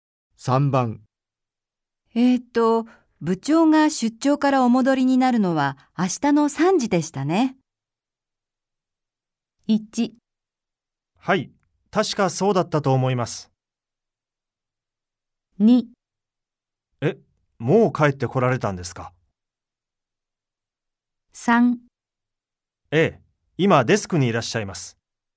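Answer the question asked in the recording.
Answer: 1: はい、確かそうだったと思います。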